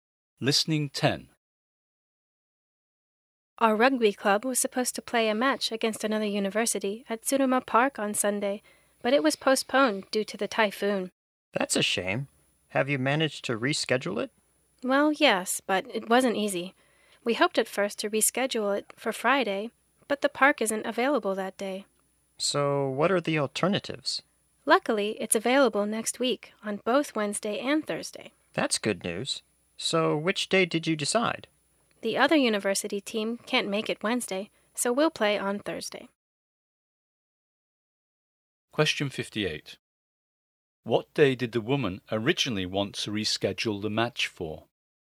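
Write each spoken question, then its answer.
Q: What day did the woman originally want to reschedule the match for?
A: Friday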